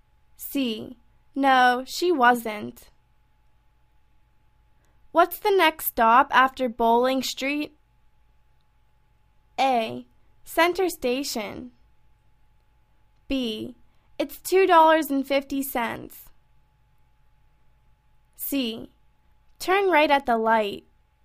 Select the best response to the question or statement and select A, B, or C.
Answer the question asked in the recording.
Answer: Center station